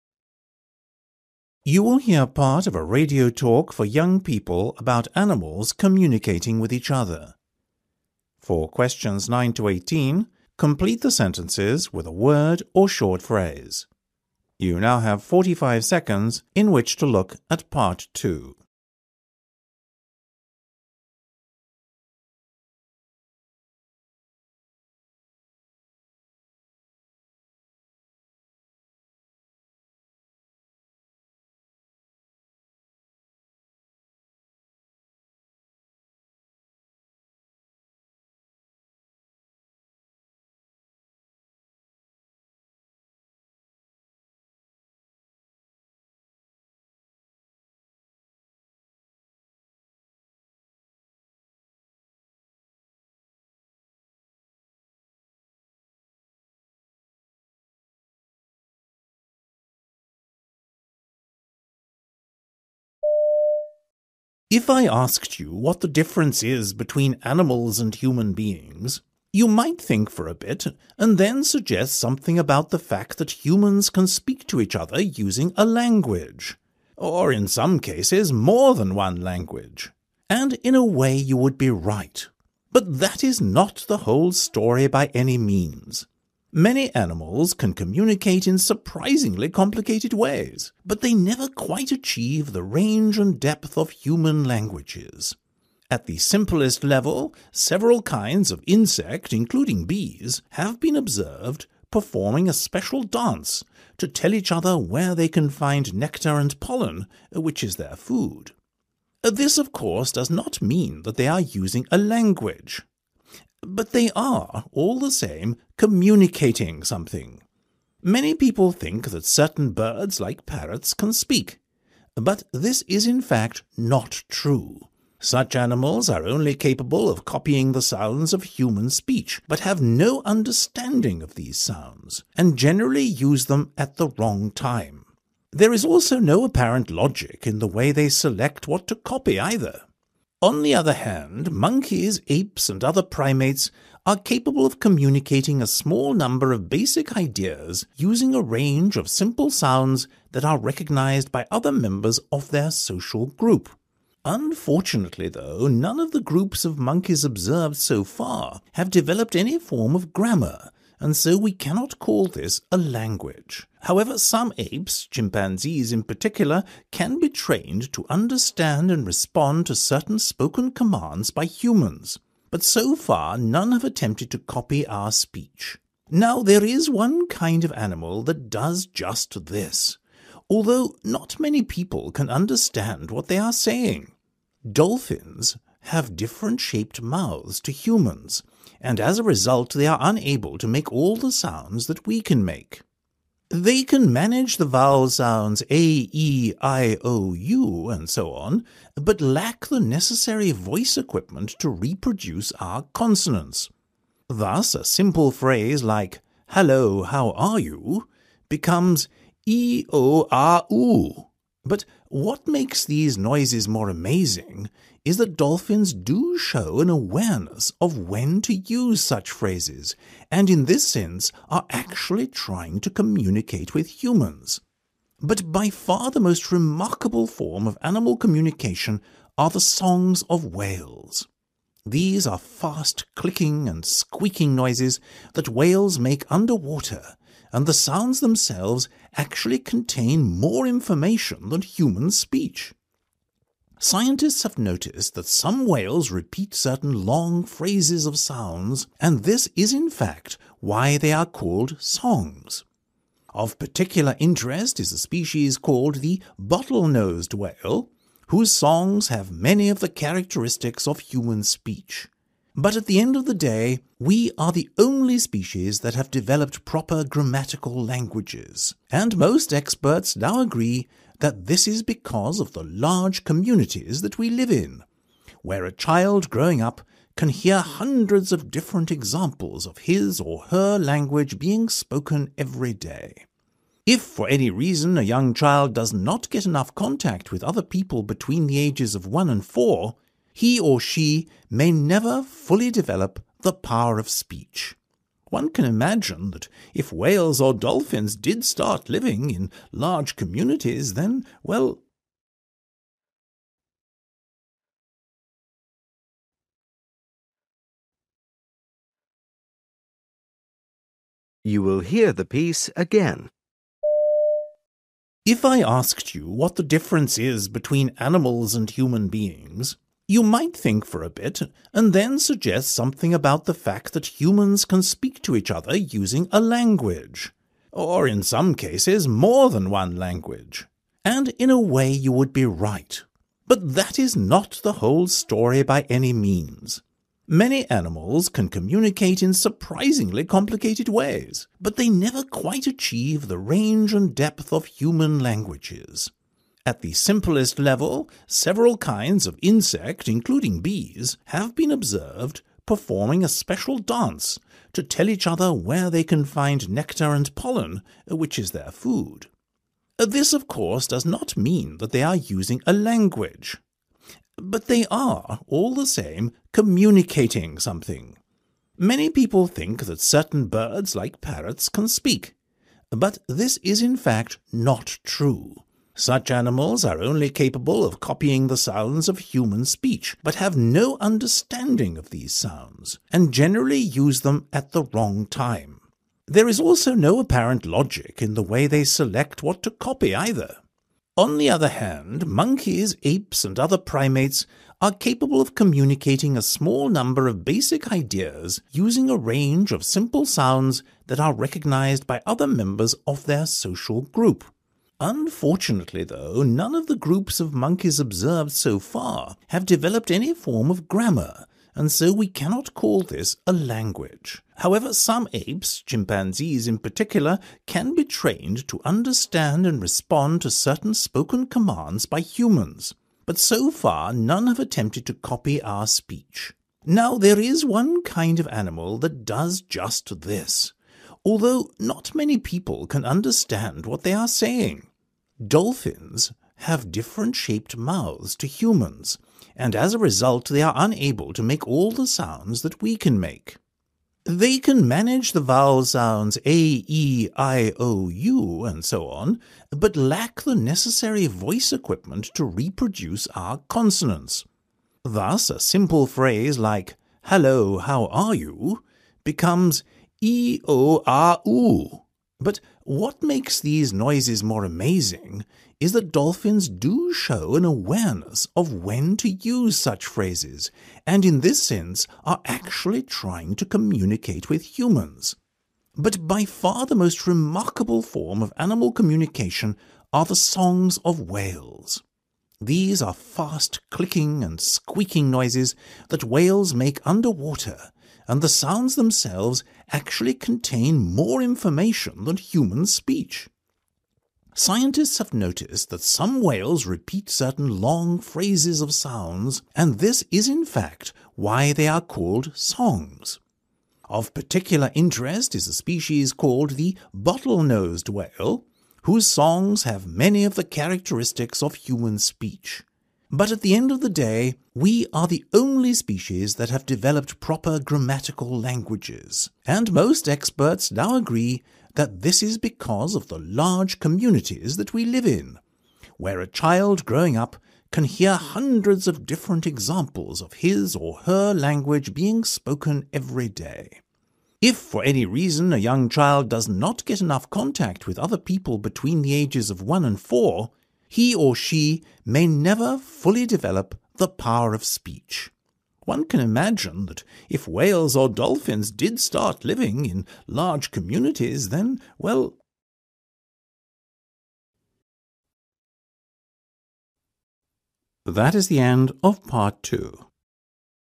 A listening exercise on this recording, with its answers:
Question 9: Bees do a (9) .............................. to communicate where to find food.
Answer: special dance

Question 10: Although parrots seem to speak, they are only (10) .............................. the human sounds.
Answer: copying

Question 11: Primates can communicate a few (11) .............................. using simple sounds.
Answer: basic ideas

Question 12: Monkeys have not been observered to use any kind of (12) .............................. .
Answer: grammar

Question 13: Although dolphins can make vowel sounds, they cannot accurately imitate our (13) .............................. .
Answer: consonants

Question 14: Amazingly, dolphins demonstrate an (14) .............................. of when to use phrases.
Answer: awareness

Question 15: The sounds made by whales contain (15) .............................. than human speech.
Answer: more information

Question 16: The songs of the bottle-nosed whale have many of the (16) .............................. of human speech.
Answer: characteristics

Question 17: The unique grammatical nature of human language arose due to life in (17) .............................. .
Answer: large communities

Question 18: Indeed, a young child needs enough (18) .............................. with other people to develop speech.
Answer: contact

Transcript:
Presenter: If I asked you what the difference is between animals and human beings, you might think for a bit and then suggest something about the fact that humans can speak to each other using a language – or in some cases more than one language – and in a way you would be right. But that is not the whole story by any means. Many animals can communicate in surprisingly complicated ways, but they never quite achieve the range and depth of human languages. At the simplest level, several kinds of insect, including bees, have been observed performing a special dance to tell each other where they can find nectar and pollen, which is their food. This, of course, does not mean that they are using a 'language' but they are, all the same, communicating something. Many people think that certain birds like parrots can speak, but this is in fact not true. Such animals are only capable of copying the sounds of human speech but have no understanding of these sounds and generally use them at the wrong time. There is also no apparent logic in the way they select what to copy either.
On the other hand, monkeys, apes and other primates are capable of communicating a small number of basic ideas using a range of simple sounds that are recognised by other members of their social group. Unfortunately though, none of the groups of monkeys observed so far have developed any form of grammar and so we cannot call this a language. However, some apes, chimpanzees in particular, can be trained to understand and respond to certain spoken commands by humans, but so far none have attempted to copy our speech. Now there is one kind of animal that does just this, although not many people can understand what they are saying. Dolphins have different shaped mouths to humans and as a result they are unable to make all the sounds that we can make. They can manage the vowel sounds 'a', 'e', 'i', 'o', 'u', ... and so on, but lack the necessary voice equipment to reproduce our consonants. Thus, a simple phrase like 'Hello, how are you?' becomes 'e – o – ah – u'. But what makes these noises more amazing is that dolphins do show an awareness of when to use such phrases and in this sense, are actually trying to communicate with humans.
But by far, the most remarkable form of animal communication are the 'songs' of whales. These are fast clicking and squeaking noises that whales make underwater and the sounds themselves actually contain more information than human speech. Scientists have noticed that some whales repeat certain long phrases of sounds, and this is in fact why they are called songs. Of particular interest is a species called the 'bottle-nosed' whale whose songs have many of the characteristics of human speech. But at the end of the day, we are the only species that have developed proper grammatical languages and most experts now agree that this is because of the large communities that we live in – where a child growing up can hear hundreds of different examples of his or her language being spoken every day. If, for any reason, a young child does not get enough contact with other people between the ages of one and four, he or she may never fully develop the power of speech. One can imagine that if whales or dolphins did start living in large communities then well ...

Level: B2